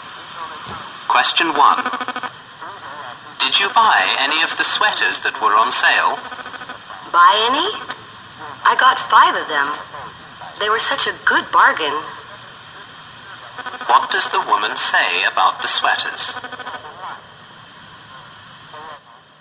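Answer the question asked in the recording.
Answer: She bought five because they were a good bargain.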